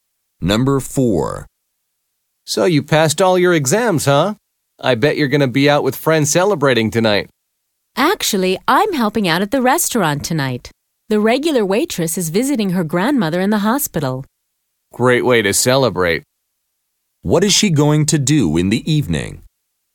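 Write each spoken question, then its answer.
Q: What is she going to do in the evening?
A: Help out (work) at the restaurant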